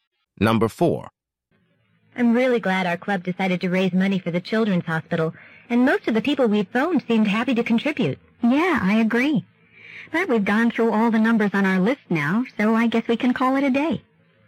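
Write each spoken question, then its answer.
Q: What can be inferred about the women?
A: They have finished phoning people for donations for the day.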